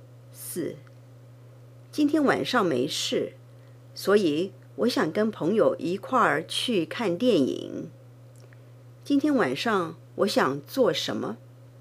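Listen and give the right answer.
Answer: 跟朋友一块儿去看电影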